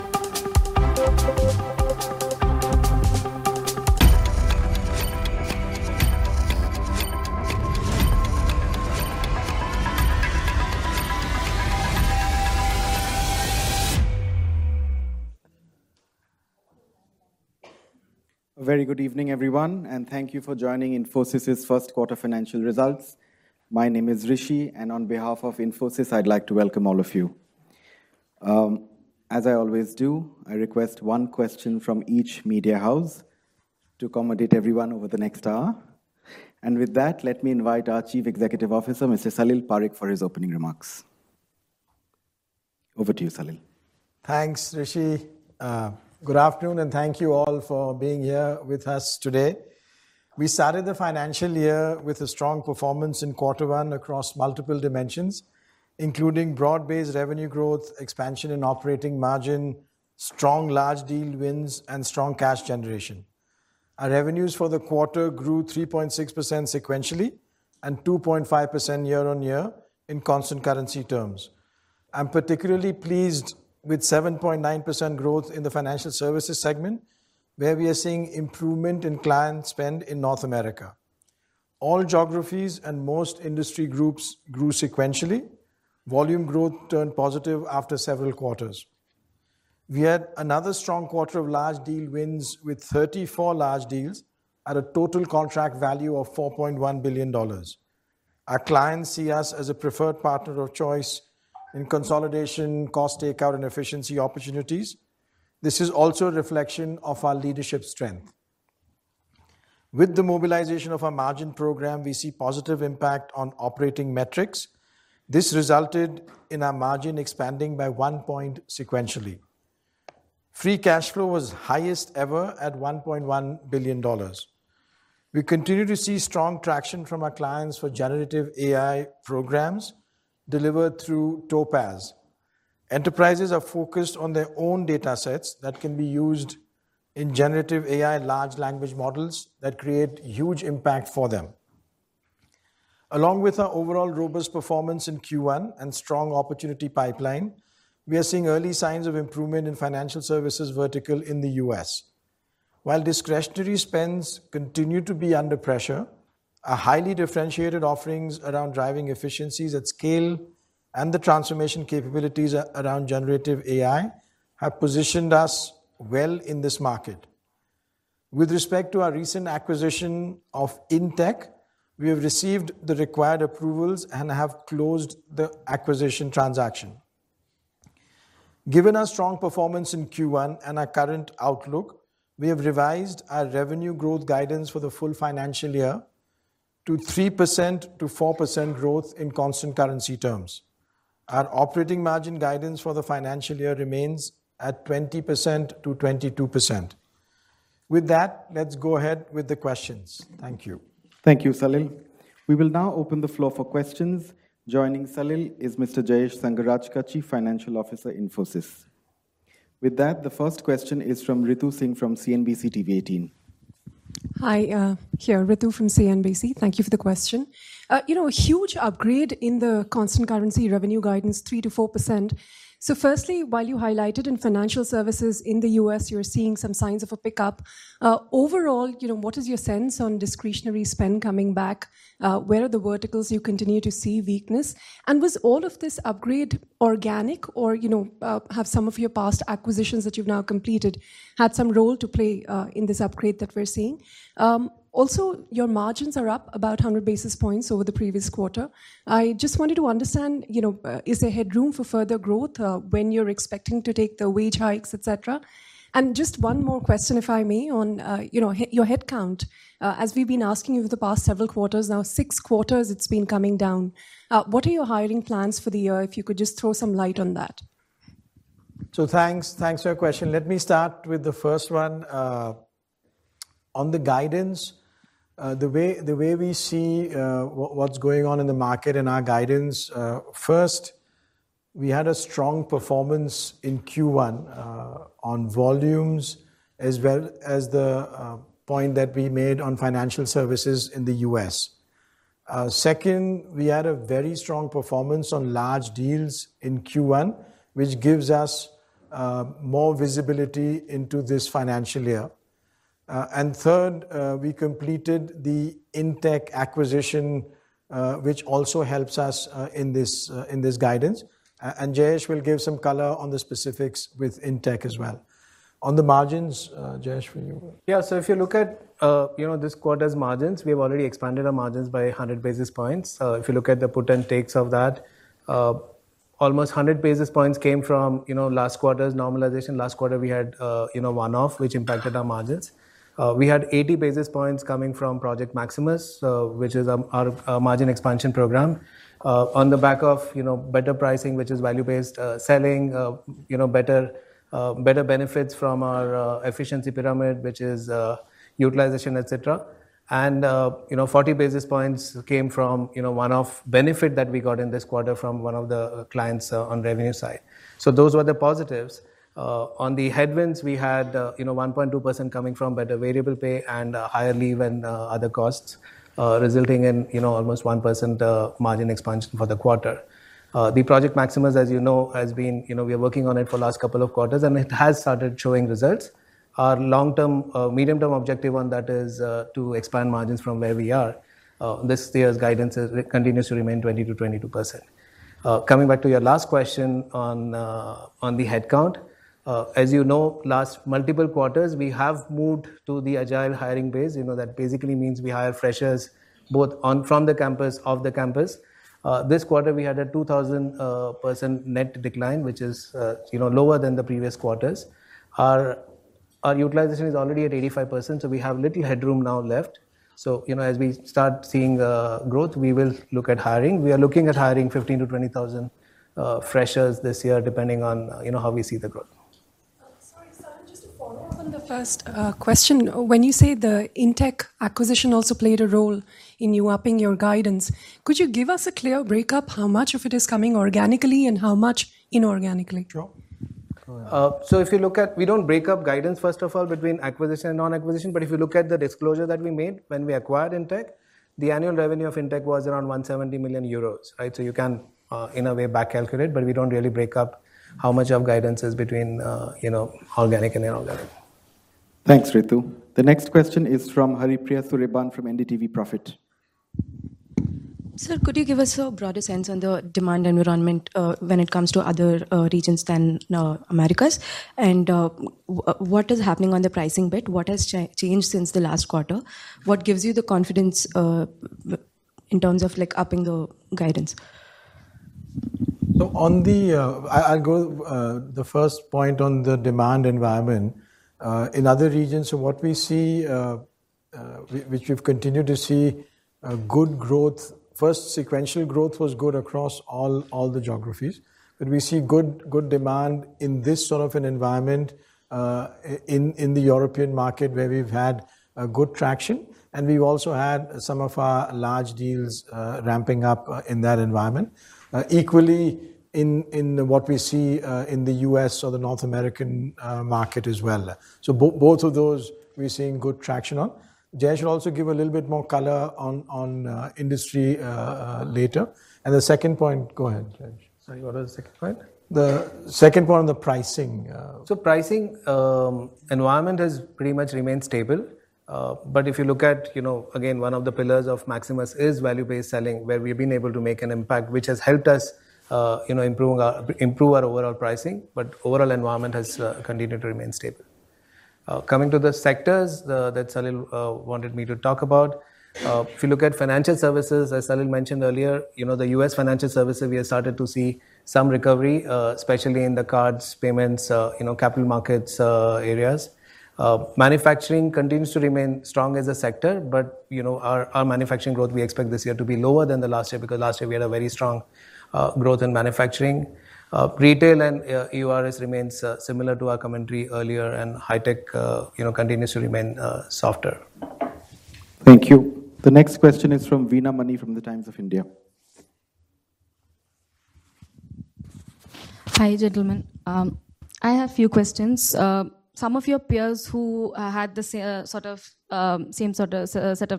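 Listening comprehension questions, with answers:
用 1-2 句话用自己的话回答下面的问题。点「✨ AI 判断」后,AI 会对照当天 transcript 给出参考要点与评分。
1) What was the total contract value of the 34 large deals Infosys won in Q1, and what was the sequential revenue growth percentage in constant currency?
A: $4.1 billion; 3.6% sequential growth

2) According to Salil, what were the three key reasons for revising the full-year revenue growth guidance to 3%–4%?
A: Strong Q1 performance on volumes (including US financial services), strong large deal wins giving visibility, and completing the Intech acquisition

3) How much did the Inch acquisition contribute annually in revenue, and in what currency, as disclosed earlier?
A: Around 170 million euros

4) What specific financial services sub-sectors in the US showed recovery, and what was the utilization rate mentioned by J?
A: Cards, payments and capital markets; utilization of 85%

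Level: CEFRC1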